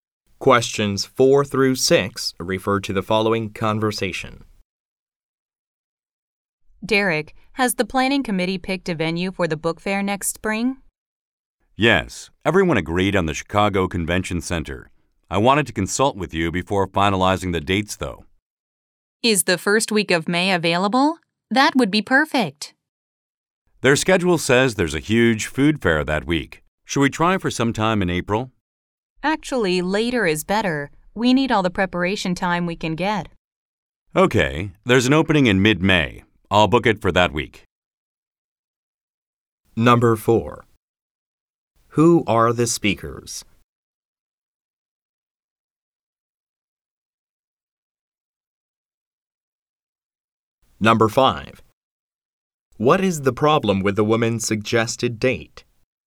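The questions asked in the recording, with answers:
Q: Who are the speakers?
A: Organizers planning a book fair

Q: What is the problem with the woman's suggested date?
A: The venue has a huge food fair that week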